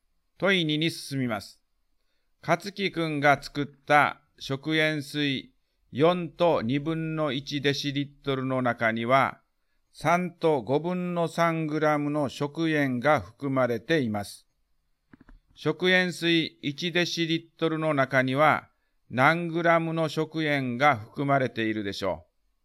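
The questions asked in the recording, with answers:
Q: 食塩水1デシリットルの中には何グラムの食塩が含まれているでしょう。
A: 5分の4グラム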